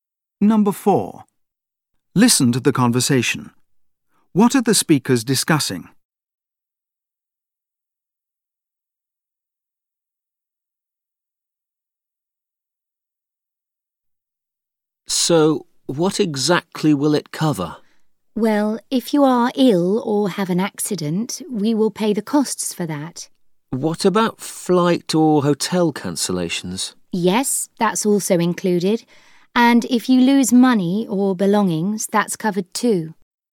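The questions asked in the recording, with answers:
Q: What are the speakers discussing?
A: Travel insurance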